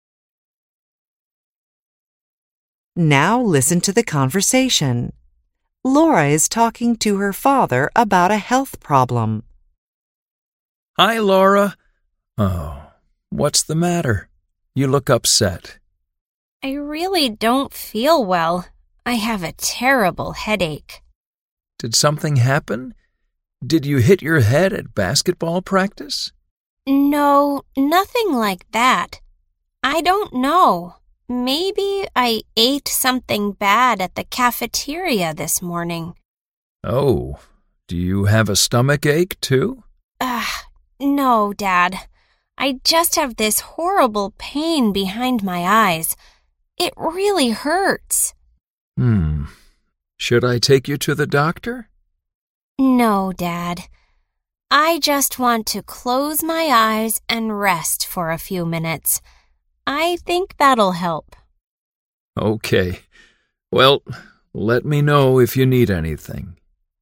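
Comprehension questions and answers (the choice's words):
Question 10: Laura ____.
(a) hit her head in a basketball game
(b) ate some bad food at school yesterday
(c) has a horrible pain in her stomach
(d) has a very bad headache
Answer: has a very bad headache

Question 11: Laura's father ____.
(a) has a stomachache too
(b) offers to take her to the doctor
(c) is going to call a doctor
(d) wants to rest a little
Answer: offers to take her to the doctor

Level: INTERMEDIATE HYBRID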